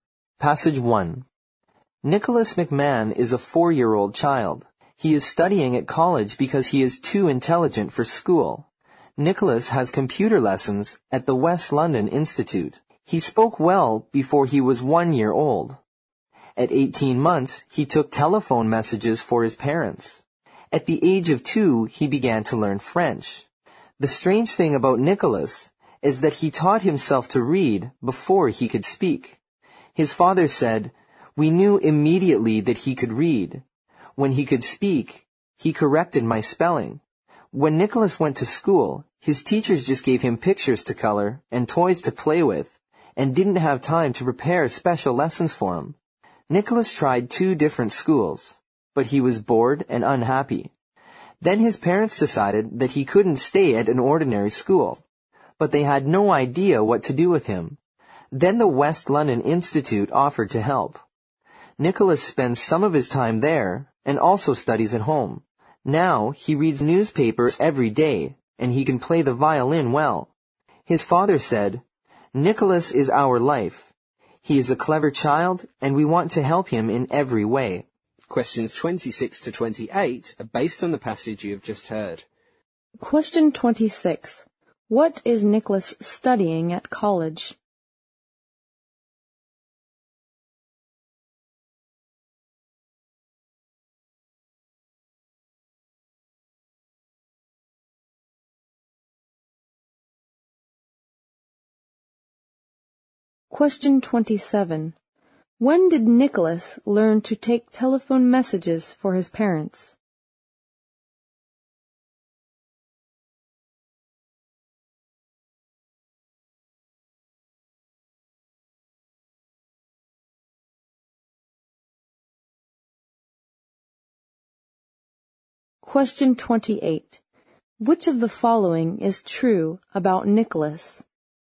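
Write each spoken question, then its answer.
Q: What is Nicholas studying at college?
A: Computers

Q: When did Nicholas learn to take telephone messages for his parents?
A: At 18 months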